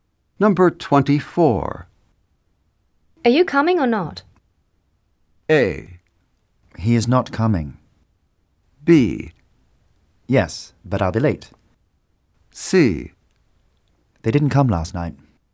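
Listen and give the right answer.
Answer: B: Yes, but I'll be late.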